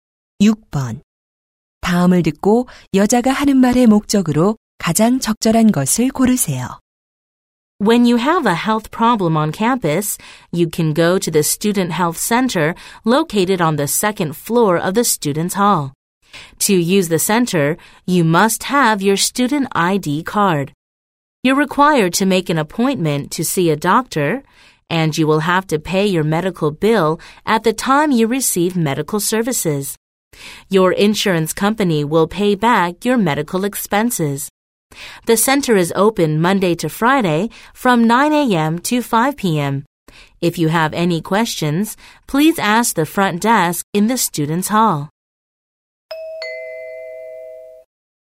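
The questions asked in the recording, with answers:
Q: 다음을 듣고 여자가 하는 말의 목적으로 가장 적절한 것을 고르세요.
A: 학생 건강 센터 이용 방법 안내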